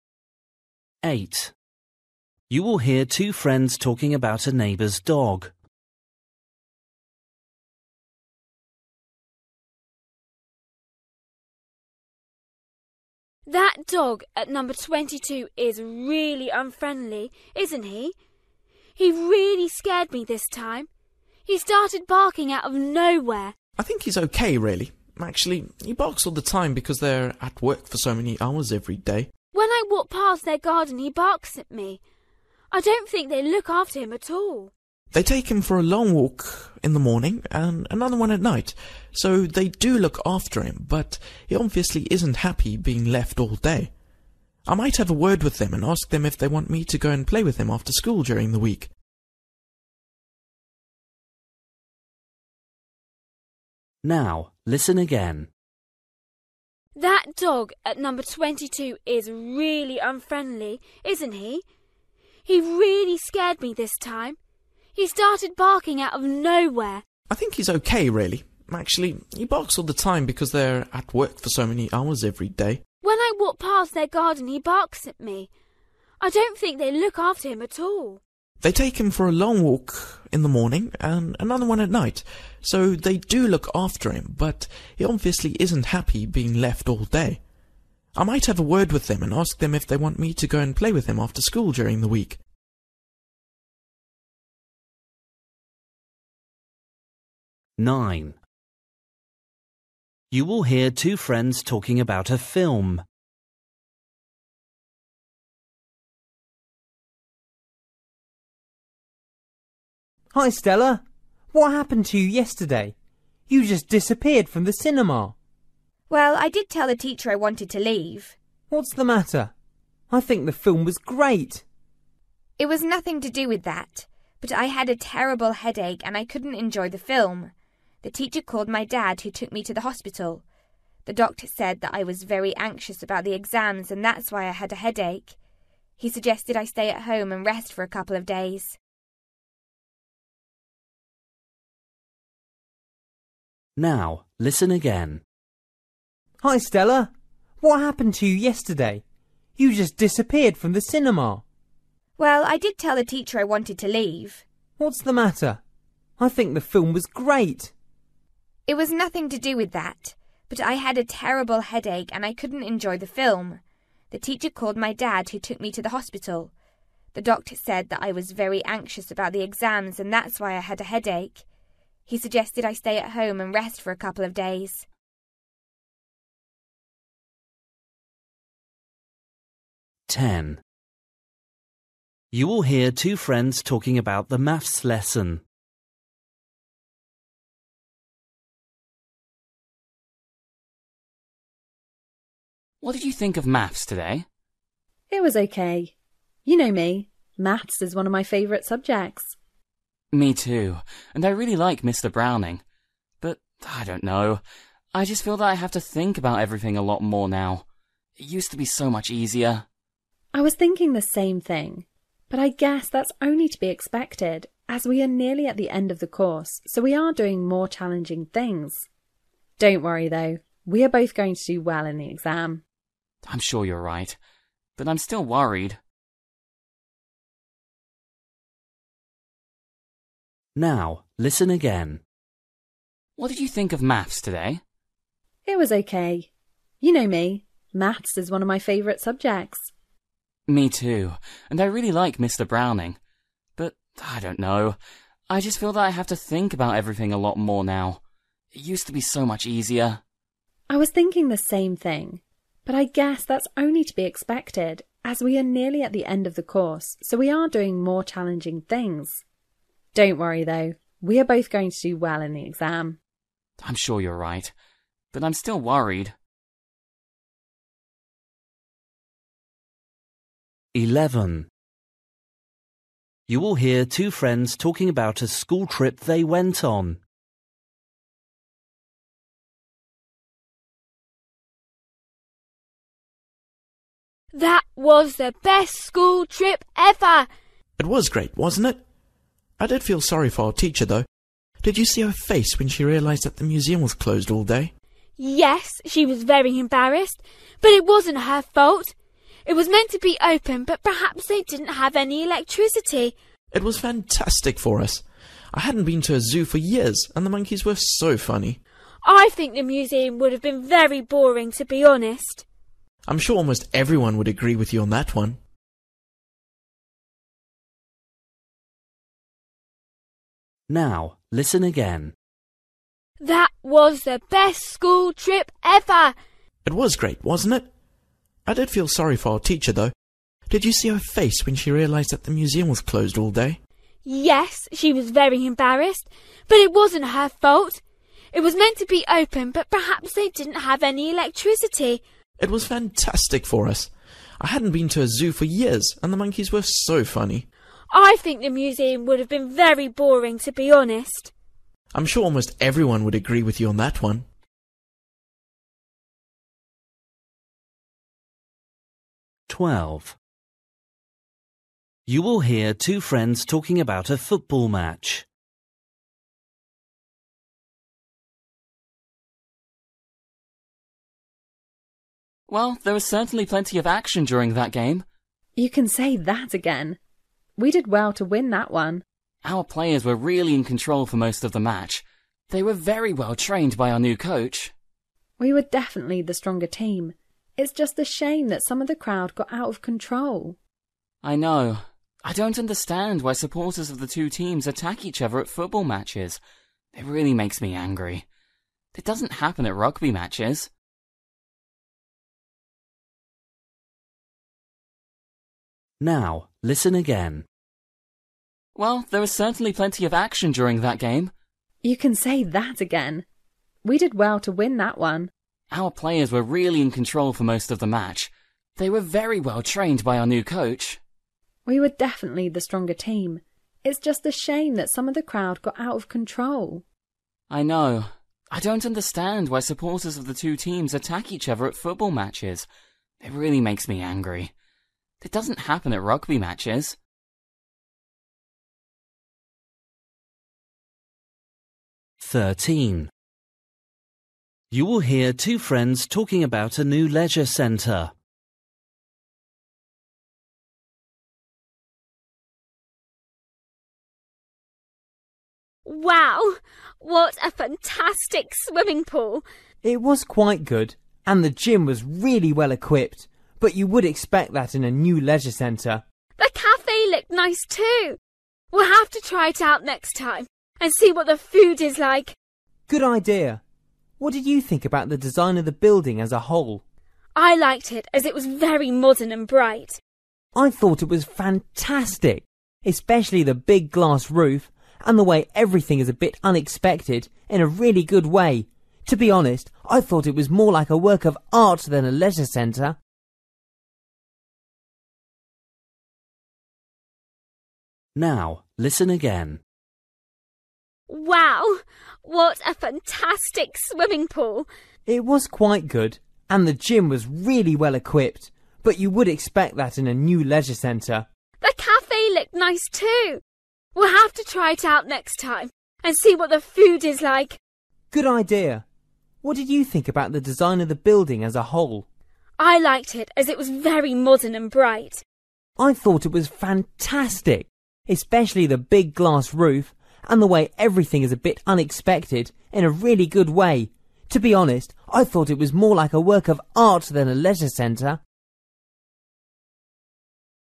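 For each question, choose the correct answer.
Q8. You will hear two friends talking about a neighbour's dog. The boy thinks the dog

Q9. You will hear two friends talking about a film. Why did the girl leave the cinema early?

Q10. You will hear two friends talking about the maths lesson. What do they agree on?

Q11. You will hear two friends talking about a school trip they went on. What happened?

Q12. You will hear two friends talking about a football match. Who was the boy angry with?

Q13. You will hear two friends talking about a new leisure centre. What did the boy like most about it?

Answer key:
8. is unhappy being left alone all day
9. She had a terrible headache.
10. Maths has become more difficult now.
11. The museum was closed, so they went to a zoo instead.
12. The supporters who fought each other.
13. The design of the building.

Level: Luyện nghe trình độ B1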